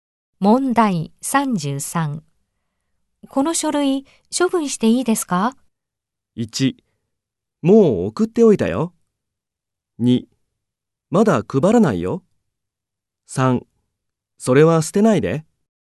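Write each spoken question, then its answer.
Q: この書類、処分していいですか?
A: 3: それは捨てないで。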